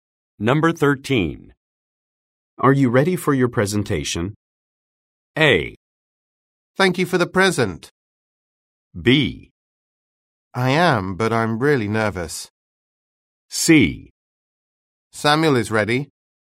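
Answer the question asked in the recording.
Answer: B: I am, but I'm really nervous.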